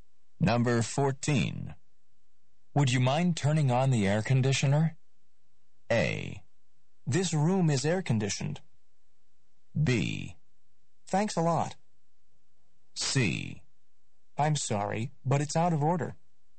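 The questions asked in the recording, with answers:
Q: Would you mind turning on the air conditioner?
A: C: I'm sorry, but it's out of order.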